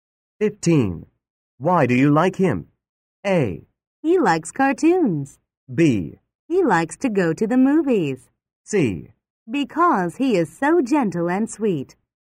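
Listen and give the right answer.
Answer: C: Because he is so gentle and sweet.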